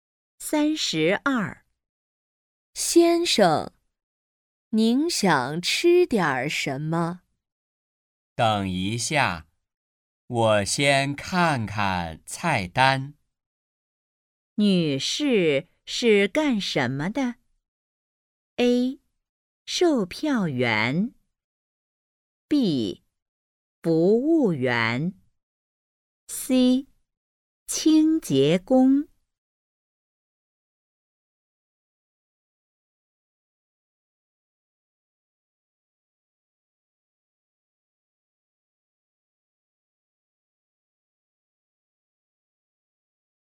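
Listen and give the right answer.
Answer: B: 服务员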